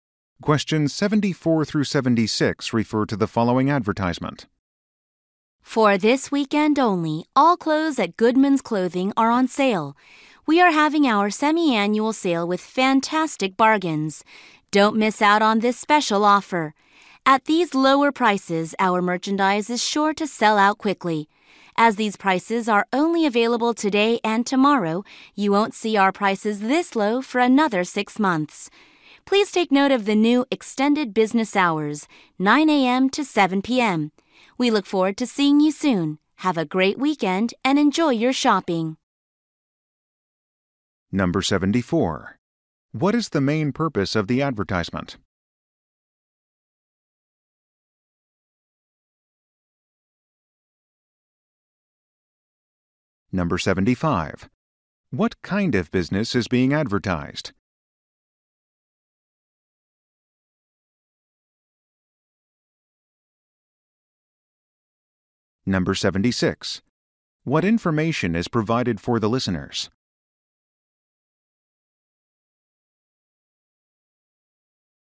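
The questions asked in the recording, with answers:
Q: What is the main purpose of the advertisement?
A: To announce a sale

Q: What kind of business is being advertised?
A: A clothing store

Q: What information is provided for the listeners?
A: New extended business hours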